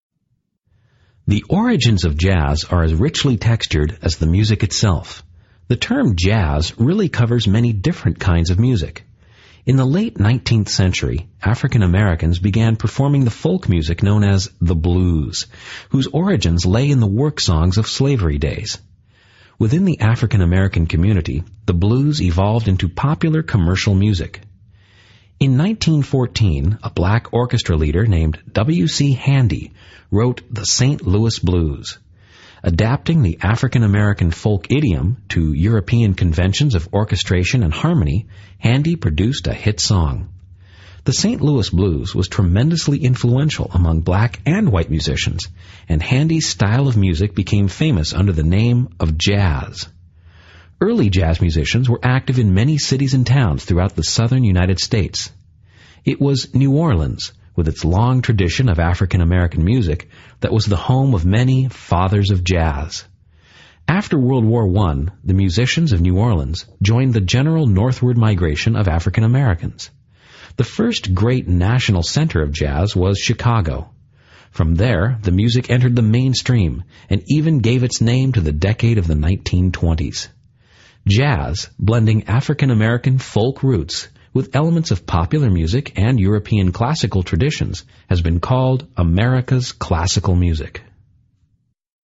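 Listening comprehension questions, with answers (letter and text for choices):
Listen to the recording and answer the multiple-choice question by selecting the correct response. Only one response is correct.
What does an instructor imply about the style of music known as the blues?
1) It contributed to European classical music.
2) It changed and developed over time.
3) It originated in Chicago in the 1920s.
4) It made many musicians wealthy.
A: 2) It changed and developed over time.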